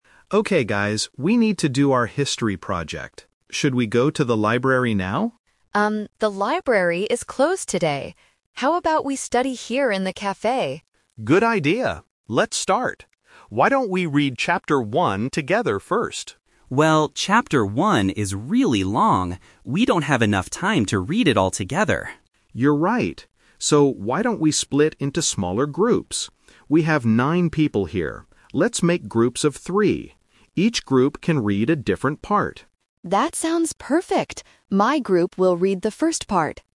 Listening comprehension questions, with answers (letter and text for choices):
Listen to a group of students talking about their project. Choose the correct answer (A, B, or C) for each question.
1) Where do the students decide to study?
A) In the library.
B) In the café.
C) In the classroom.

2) What is the problem with Chapter 1?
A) It is too difficult to understand.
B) It is the wrong chapter.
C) It is too long to read together.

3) How many students will be in each small group?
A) Three students.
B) Nine students.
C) One student.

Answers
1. B) In the café.
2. C) It is too long to read together.
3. A) Three students.

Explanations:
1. Emma says, "How about we study here in the café?" and Nick answers, "Good idea." Why the traps are wrong: Option (A) is the "Twist" trap. Nick wanted to go to the library, but Emma says it is closed. Option (C) is a plausible place to study but is never mentioned in the audio.
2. Lucas clearly says, "Well, Chapter 1 is really long. We don't have enough time to read it all together." Why the traps are wrong: Options (A) and (B) are common problems when studying, but the students do not say the chapter is difficult or wrong, only that it is long.
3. Nick makes a suggestion: "Let's make groups of three." Why the traps are wrong: Option (B) is a trap using a number from the audio. Nick says, "We have nine people here," which is the total number of people, not the size of the small groups. Option (C) is not mentioned.

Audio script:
Nick (Leader): Okay guys, we need to do our history project. Should we go to the library now?
Emma: Um, the library is closed today. How about we study here in the café?
Nick: Good idea. Let's start. Why don't we read Chapter 1 together first?
Lucas: Well, Chapter 1 is really long. We don't have enough time to read it all together.
Nick: You're right. So, why don't we split into smaller groups? We have nine people here. Let's make groups of three. Each group can read a different part.